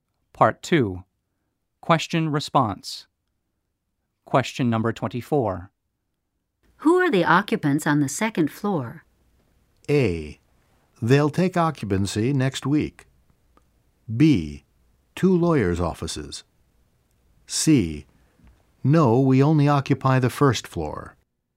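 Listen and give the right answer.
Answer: B: Two lawyers' offices.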